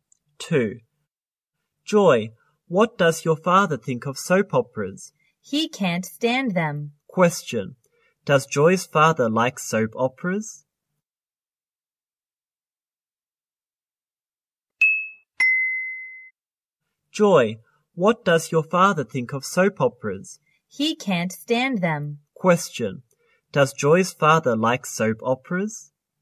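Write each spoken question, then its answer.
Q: Does Joy's father like soap operas?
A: No, he can't stand them.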